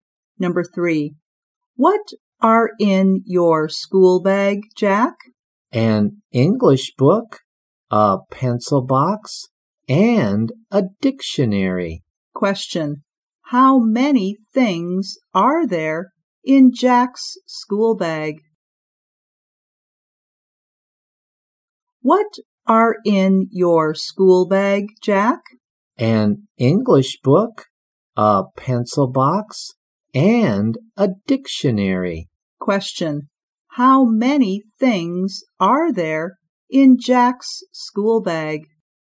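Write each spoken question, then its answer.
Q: Question.How many things are there in Jack's school bag?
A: Three.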